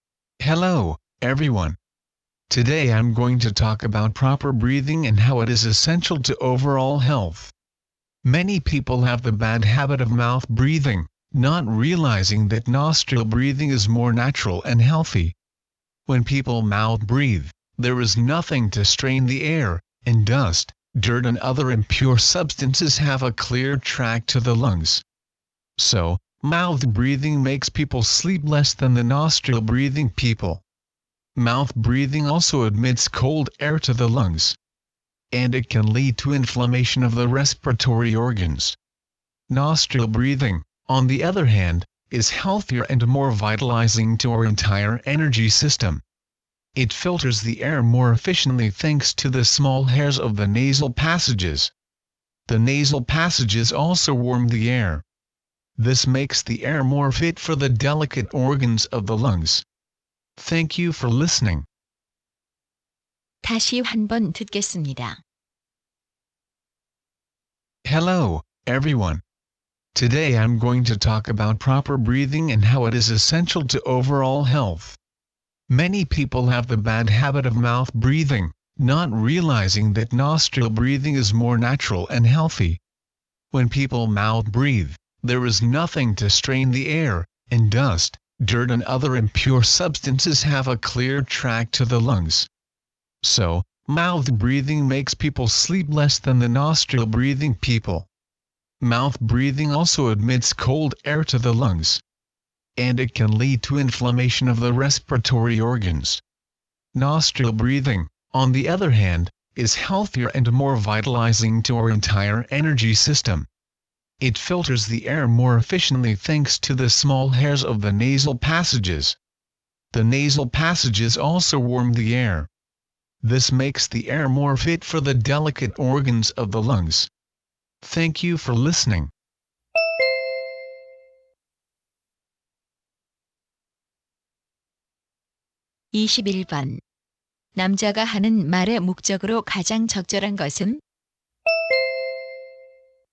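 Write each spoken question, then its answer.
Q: 남자가 하는 말의 목적으로 가장 적절한 것은?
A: 코로 숨쉬기가 입으로 숨쉬기보다 건강에 좋다는 것을 설명하려고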